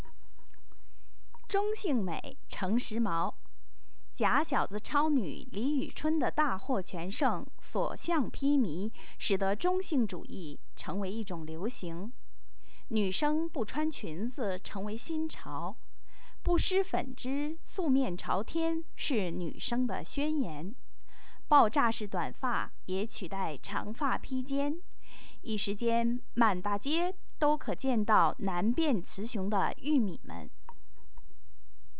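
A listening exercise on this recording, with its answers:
Please answer the following questions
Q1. 什么是现在流行的"中性美"?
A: 女生不穿裙子、不化妆、素面朝天,留爆炸式短发

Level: 3rd Year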